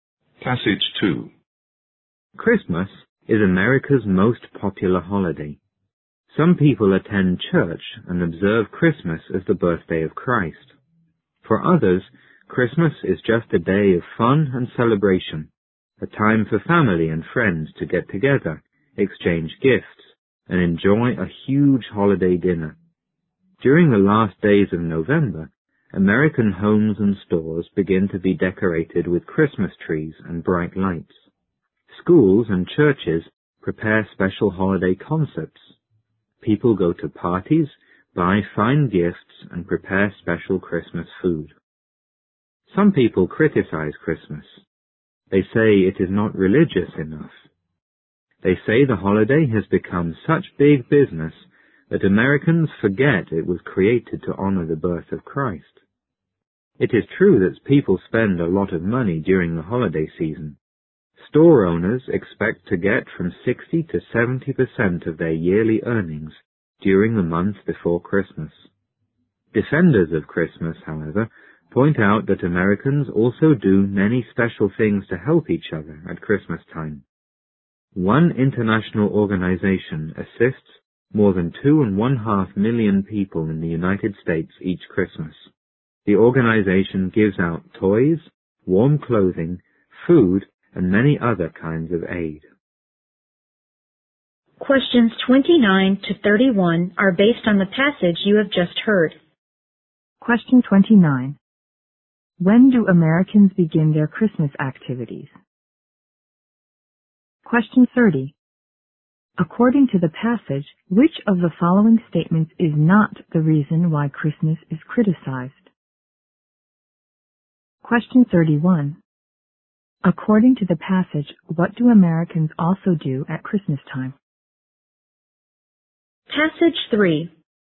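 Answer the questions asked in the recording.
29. During the last days of November
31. They do many special things to help each other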